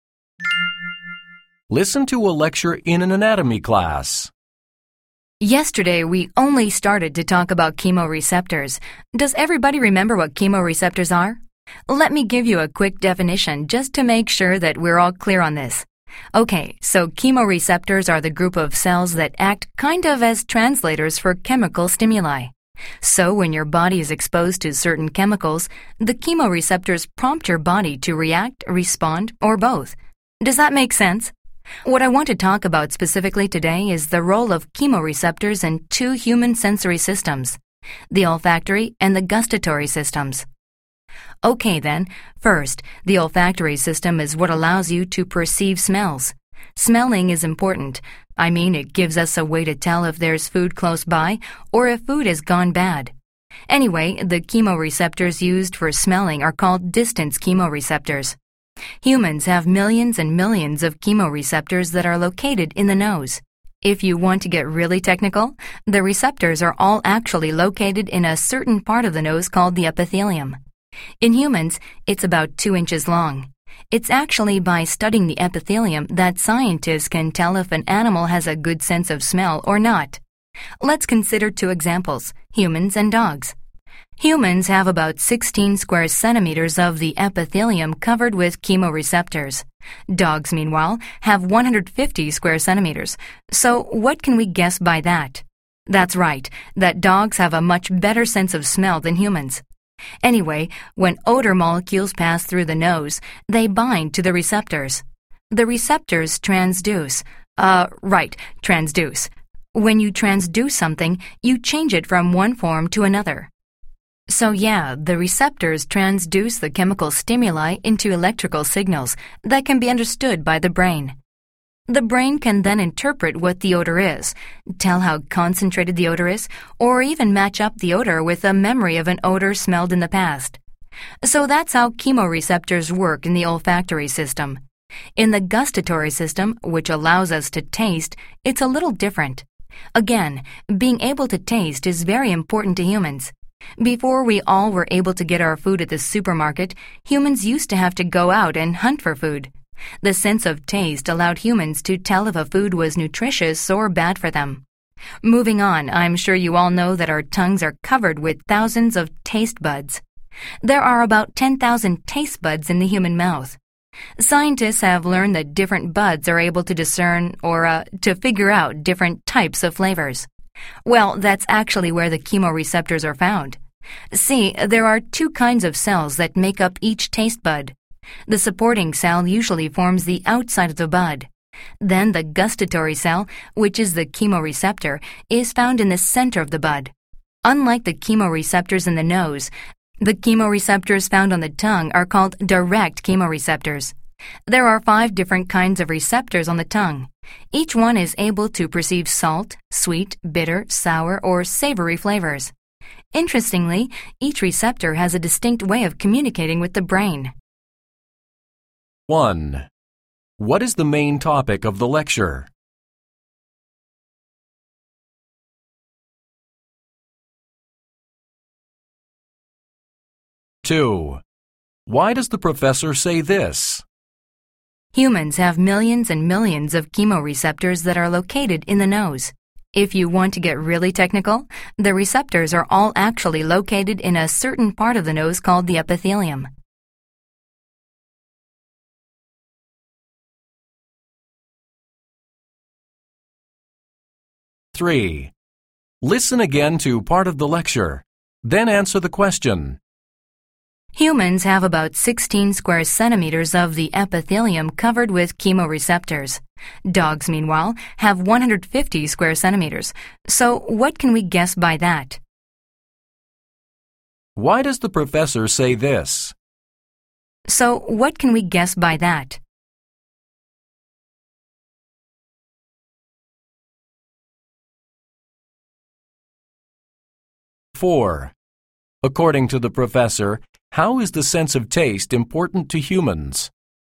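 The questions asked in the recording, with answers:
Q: What is the main topic of the lecture?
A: The role of chemoreceptors in the human senses of smell (olfactory system) and taste (gustatory system)

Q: According to the professor, how is the sense of taste important to humans?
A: It lets humans tell whether a food is nutritious or bad for them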